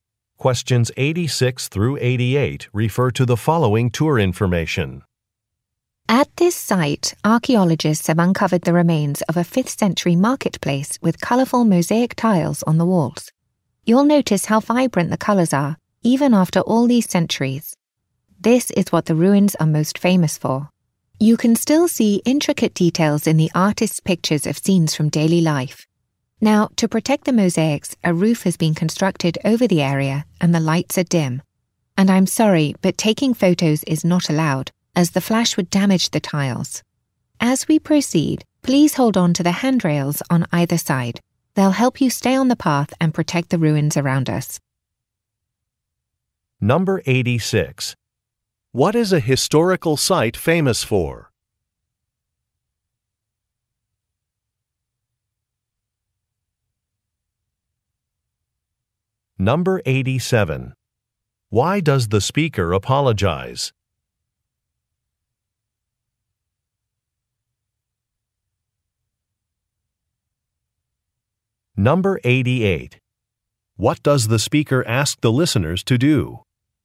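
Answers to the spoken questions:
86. Its vibrant colorful mosaic tiles
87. Taking photos is not allowed
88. Hold on to the handrails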